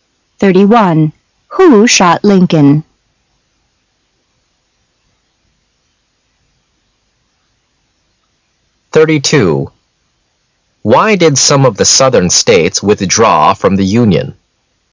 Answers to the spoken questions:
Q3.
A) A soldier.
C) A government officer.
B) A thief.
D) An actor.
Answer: D) An actor.
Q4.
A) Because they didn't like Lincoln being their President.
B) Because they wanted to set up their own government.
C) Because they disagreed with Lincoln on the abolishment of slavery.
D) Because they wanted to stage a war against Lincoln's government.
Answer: C) Because they disagreed with Lincoln on the abolishment of slavery.

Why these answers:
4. 信息明示题。女士问男士为什么站在外面不进去,男士回答说他试了所有的钥匙,就是打不开门,由此可知,C正确。本题的关键是弄清让指代的是the door。 [考点] instead of在意为"代替"时与in place of同义;它还可后接动名词表示"而不",如:Instead of going to the cinema,I'm going to the concert tomorrow,我明天去听音乐会,丽不去看电影。

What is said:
[解析] Why did some of the Southern states withdraw from the Union?